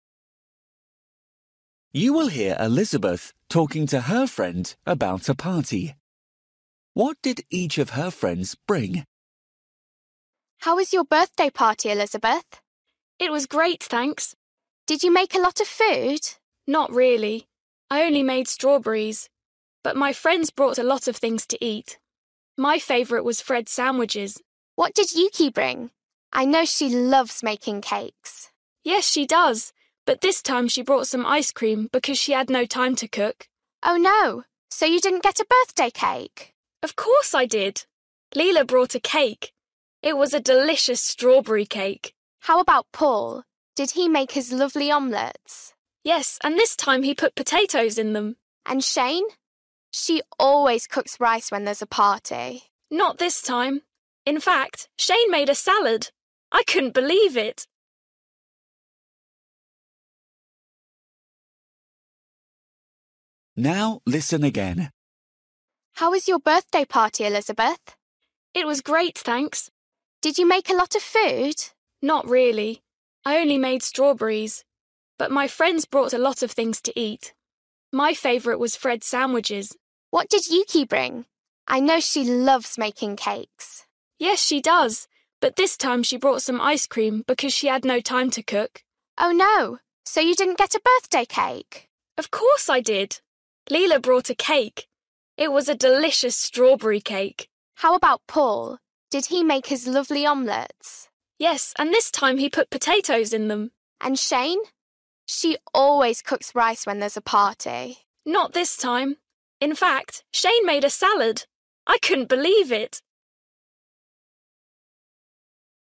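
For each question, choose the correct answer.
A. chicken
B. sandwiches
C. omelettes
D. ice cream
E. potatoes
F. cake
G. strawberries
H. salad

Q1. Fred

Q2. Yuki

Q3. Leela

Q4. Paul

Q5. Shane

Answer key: 1B, 2D, 3F, 4C, 5H

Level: Luyện nghe trình độ A2

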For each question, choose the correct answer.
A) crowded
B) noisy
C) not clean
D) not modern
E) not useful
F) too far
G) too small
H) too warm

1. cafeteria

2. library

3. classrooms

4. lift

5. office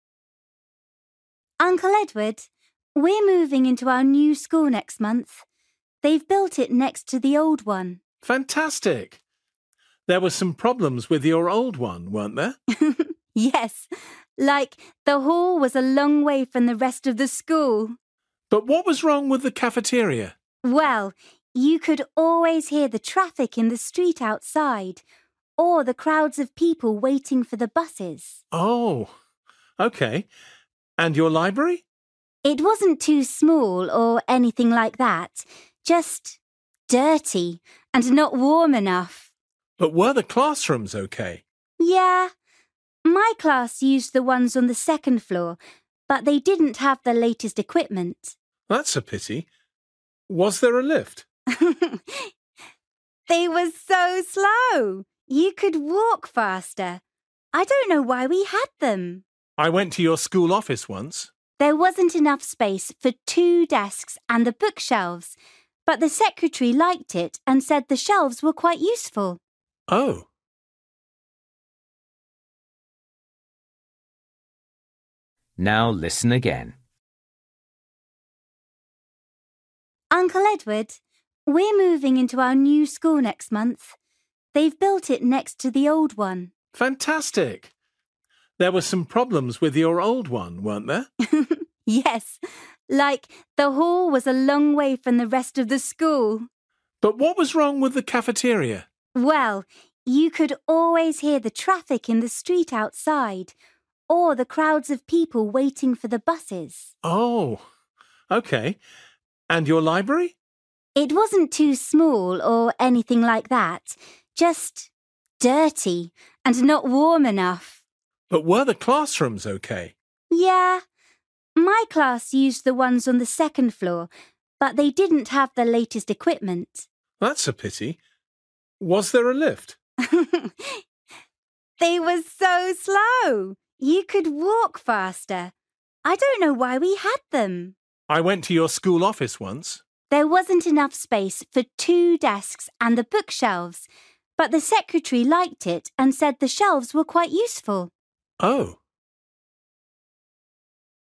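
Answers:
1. B
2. C
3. D
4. E
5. G

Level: Luyện nghe trình độ A2

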